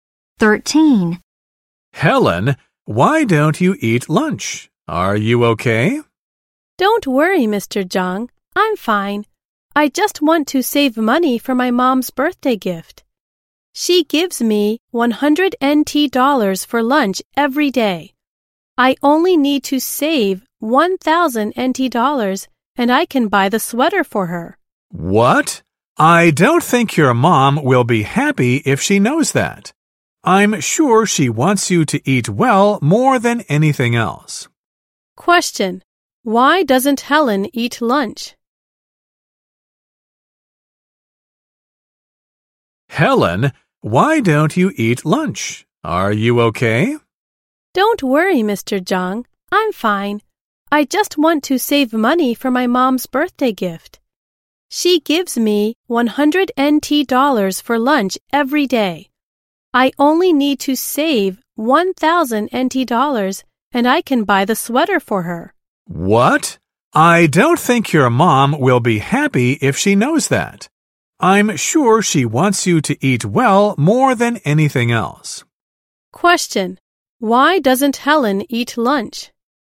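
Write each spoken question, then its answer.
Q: Why doesn't Helen eat lunch?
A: She wants to save money for her mom's birthday gift.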